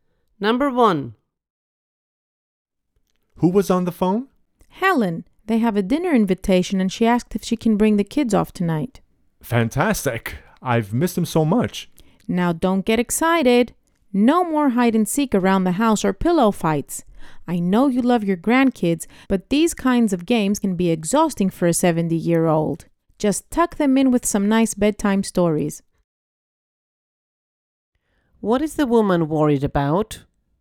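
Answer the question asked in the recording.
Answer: That energetic games with the grandkids will exhaust the 70-year-old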